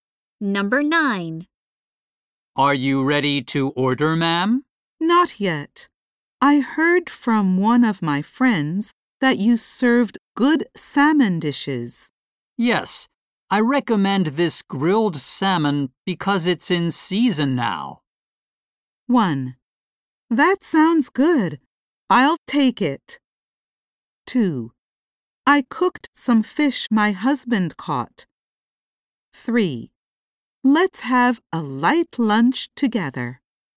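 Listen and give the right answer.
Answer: 1: That sounds good. I'll take it.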